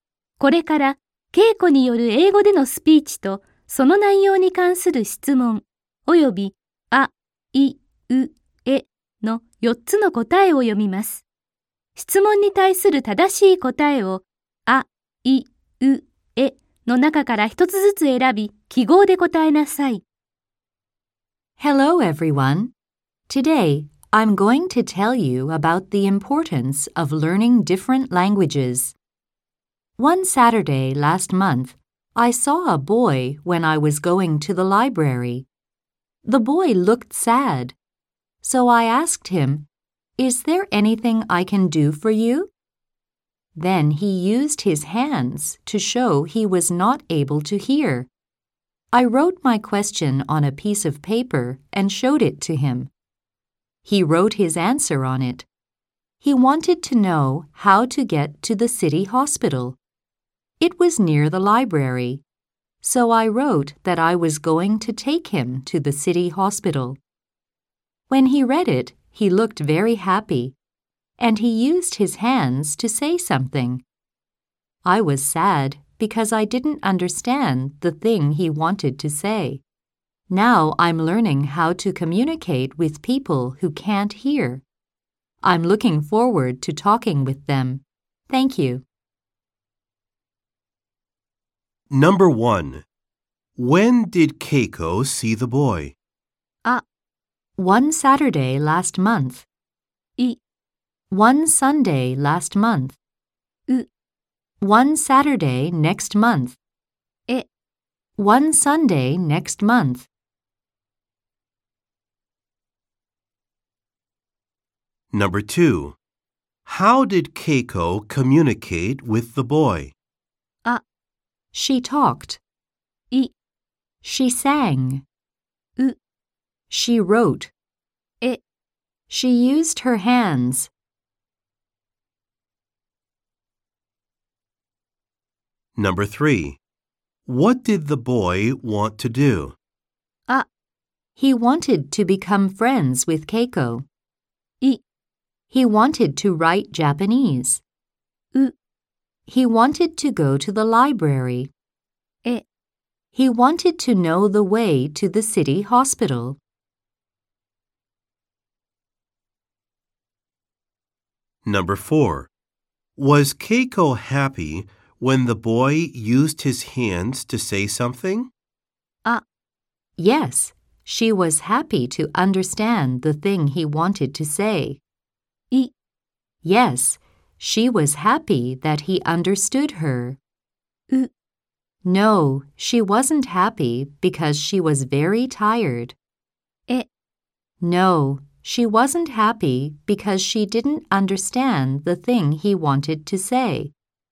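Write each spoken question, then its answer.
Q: When did Keiko see the boy?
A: あ: One Saturday last month.

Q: How did Keiko communicate with the boy?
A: う: She wrote.

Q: What did the boy want to do?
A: え: He wanted to know the way to the city hospital.

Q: Was Keiko happy? When the boy used his hands to say something?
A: え: No, she wasn't happy because she didn't understand the thing he wanted to say.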